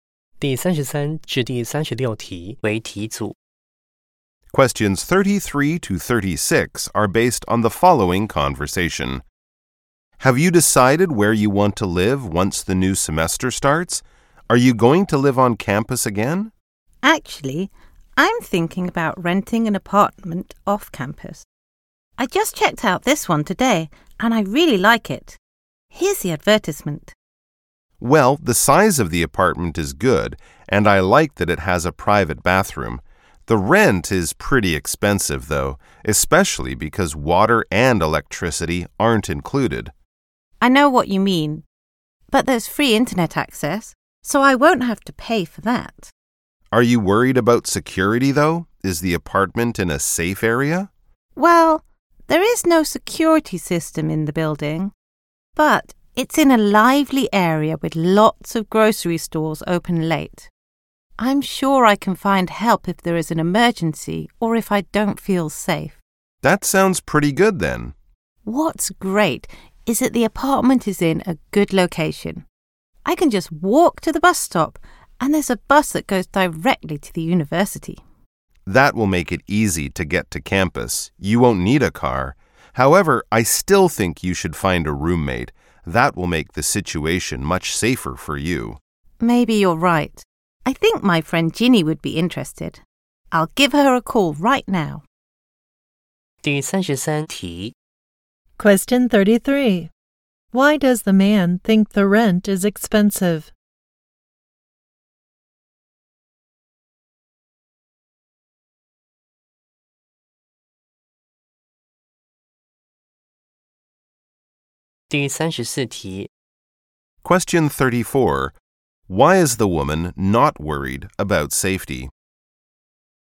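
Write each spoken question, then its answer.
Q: Why does the man think the rent is expensive?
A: Water and electricity aren't included

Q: Why is the woman not worried about safety?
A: The area is lively, with many grocery stores open late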